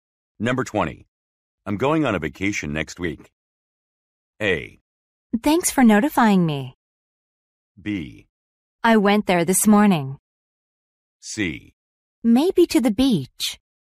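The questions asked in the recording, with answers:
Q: I'm going on a vacation next week.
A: A: Thanks for notifying me.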